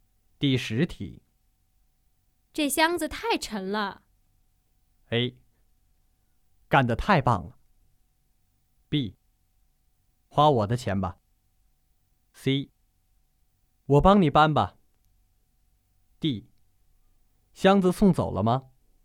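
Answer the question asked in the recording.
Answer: C: 我帮你搬吧。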